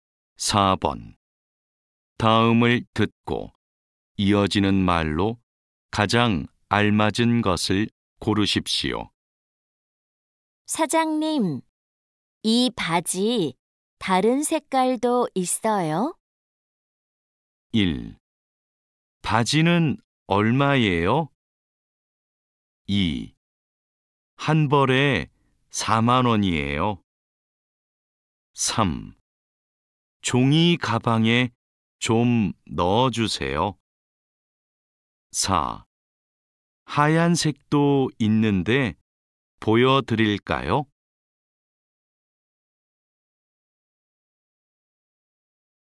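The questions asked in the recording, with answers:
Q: 사장님, 이 바지 다른 색깔도 있어요?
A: 4: 하얀색도 있는데 보여드릴까요?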